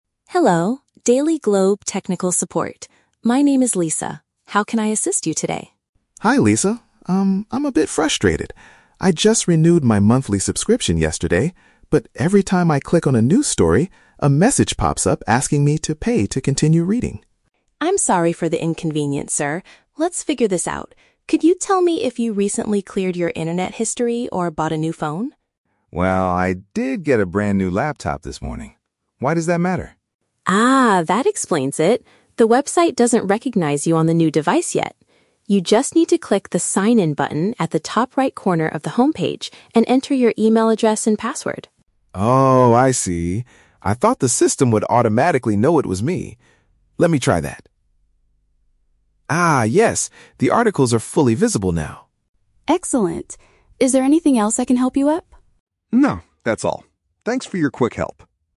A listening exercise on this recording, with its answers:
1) Why is the man contacting technical support?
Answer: He is unable to access the full text of the online articles.

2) What caused the problem with the man's account?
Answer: He is using a recently purchased computer.

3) What does the technical support worker instruct the man to do?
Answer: Provide his personal details to log into the system.

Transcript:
Lisa: Hello, Daily Globe technical support. My name is Lisa. How can I assist you today?
Mark: Hi, Lisa. Um, I'm a bit frustrated. I just renewed my monthly subscription yesterday, but every time I click on a news story, a message pops up asking me to pay to continue reading.
Lisa: I'm sorry for the inconvenience, sir. Let's figure this out. Could you tell me if you recently cleared your internet history or bought a new phone?
Mark: Well, I did get a brand new laptop this morning. Why does that matter?
Lisa: Ah, that explains it! The website doesn't recognize you on the new device yet. You just need to click the 'Sign In' button at the top right corner of the homepage and enter your email address and password.
Mark: Oh, I see. I thought the system would automatically know it was me. Let me try that... Ah, yes! The articles are fully visible now.
Lisa: Excellent. Is there anything else I can help you with?
Mark: No, that's all. Thanks for your quick help.